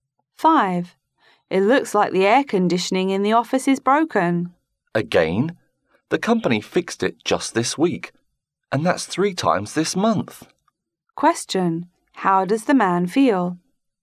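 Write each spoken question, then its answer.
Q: How does the man feel?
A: Annoyed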